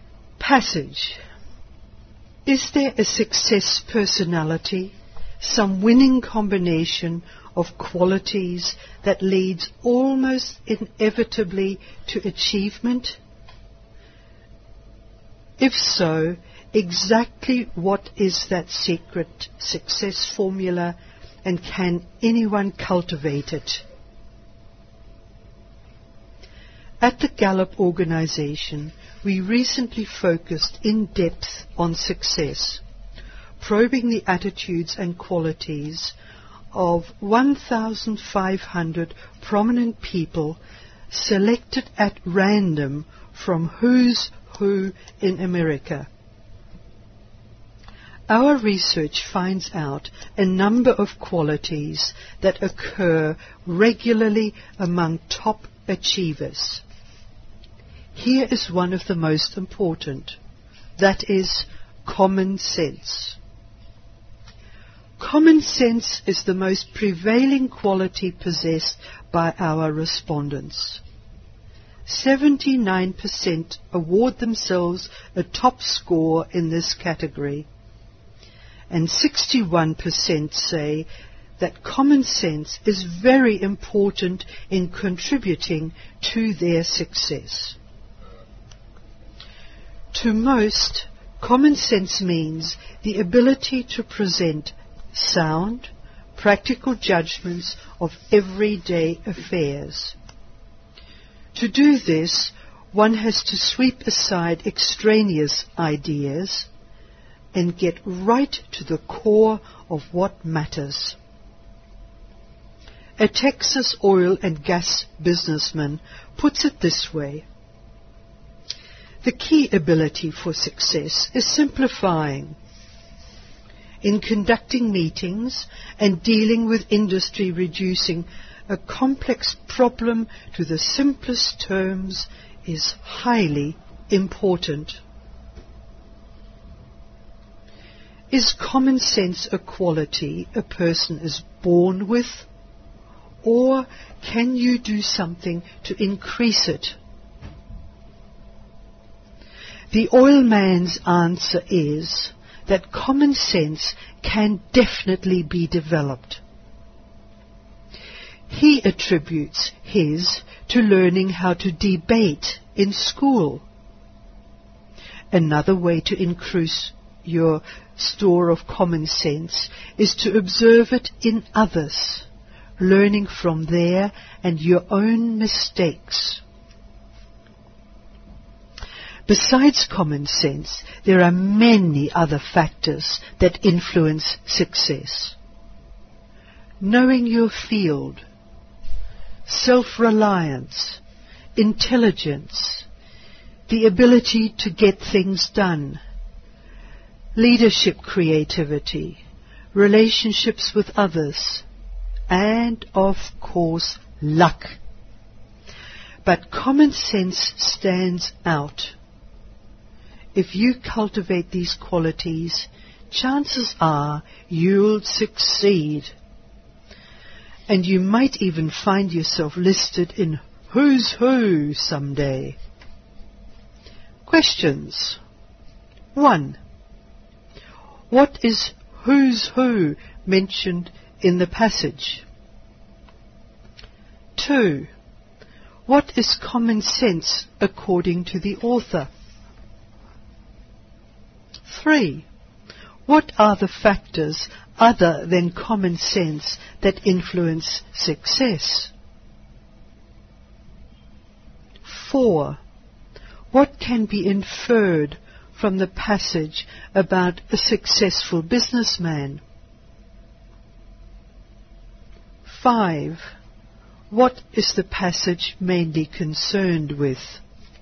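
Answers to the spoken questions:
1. A book listing prominent people in America
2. The ability to make sound, practical judgments of everyday affairs
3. Knowing your field, self-reliance, intelligence, getting things done, leadership, creativity, relationships with others, and luck
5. The qualities that lead to success, especially common sense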